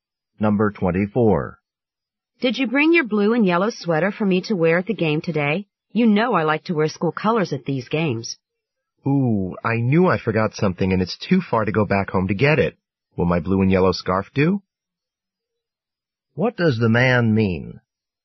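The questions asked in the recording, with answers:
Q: What does the man mean?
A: He forgot the sweater but can offer his blue and yellow scarf.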